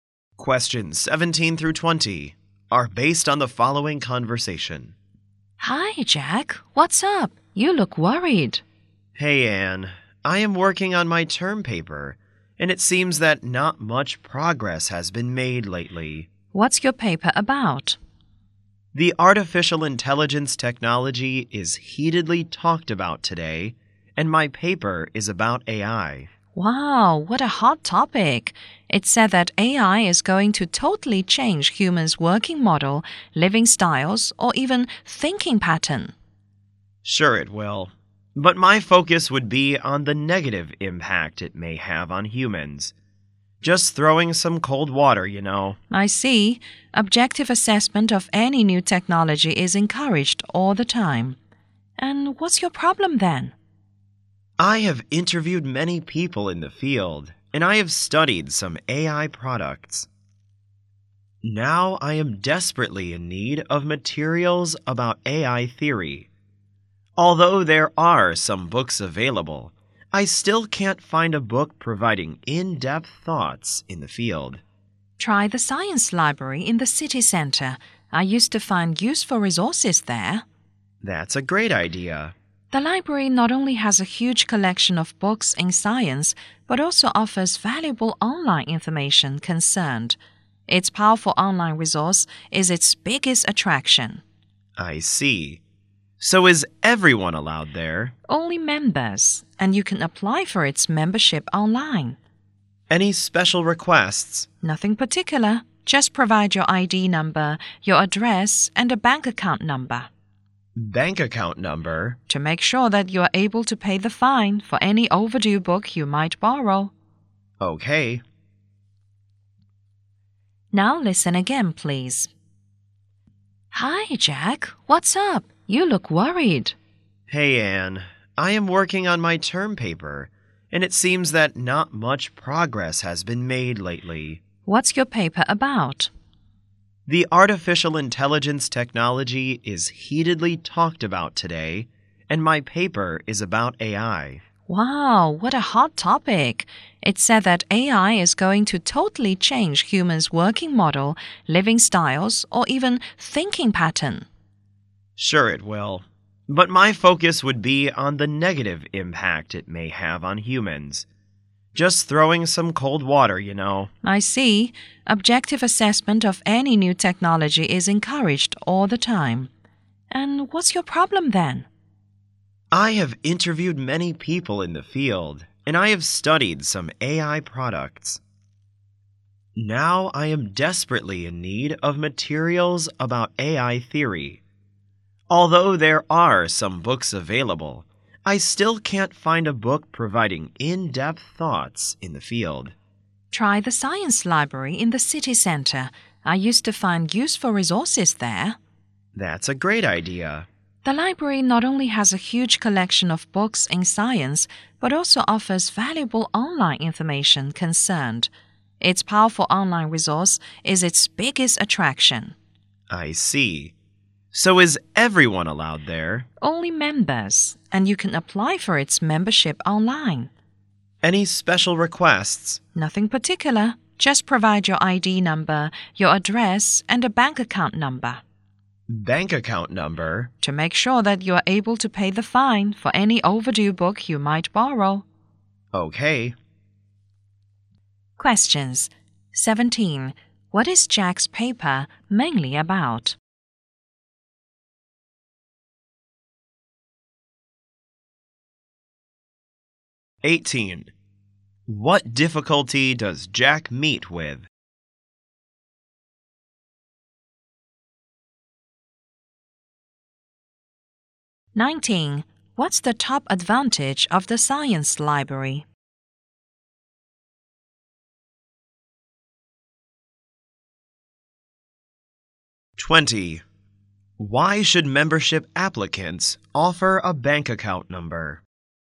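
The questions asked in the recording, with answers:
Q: What is Jack's paper mainly about?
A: The negative impact of AI on humans

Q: What difficulty does Jack meet with?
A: He can't find in-depth materials on AI theory

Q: What's the top advantage of the science library?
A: Its powerful online resources

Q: Why should membership applicants offer a bank account number?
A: To make sure they can pay fines for overdue books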